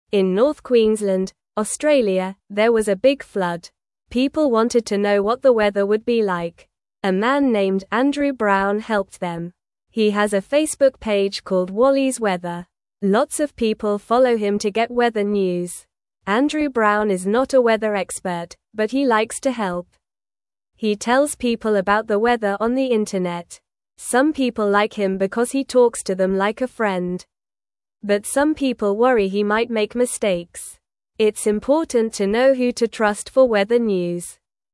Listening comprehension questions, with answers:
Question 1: People (1)______ to know what the (2)______ would be like.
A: wanted

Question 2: People (1)______ to know what the (2)______ would be like.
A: weather

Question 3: A man named Andrew Brown (3)______ them.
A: helped

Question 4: He has a Facebook (4)______ called Wally's Weather.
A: page

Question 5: Andrew Brown is not a weather expert, but he (5)______ to help.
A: likes

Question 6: He tells people about the weather on the (6)______.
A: internet

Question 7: Some people like him because he (7)______ to them like a friend.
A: talks

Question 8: It's important to (8)______ who to trust for weather news.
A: know

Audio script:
In North Queensland, Australia, there was a big flood. People wanted to know what the weather would be like. A man named Andrew Brown helped them. He has a Facebook page called Wally's Weather. Lots of people follow him to get weather news.
Andrew Brown is not a weather expert, but he likes to help. He tells people about the weather on the internet. Some people like him because he talks to them like a friend. But some people worry he might make mistakes. It's important to know who to trust for weather news.

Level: Level 1